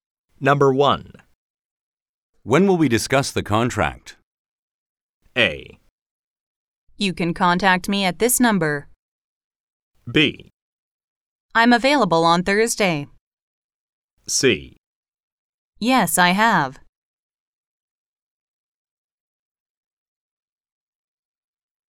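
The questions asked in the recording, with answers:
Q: When will we discuss the contract?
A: B: I'm available on Thursday.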